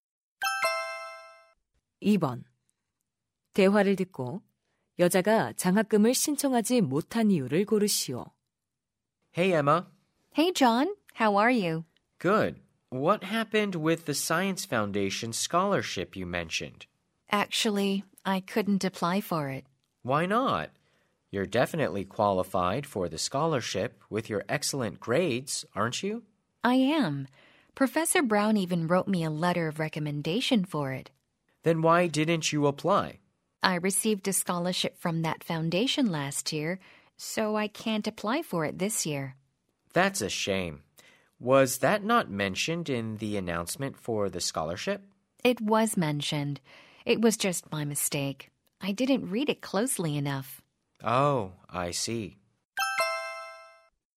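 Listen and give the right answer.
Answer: 작년에 같은 재단의 장학금을 받아서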